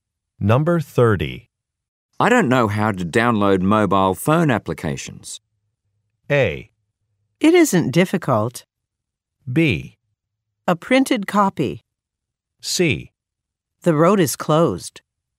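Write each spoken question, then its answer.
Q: I don't know how to download mobile phone applications.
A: A: It isn't difficult.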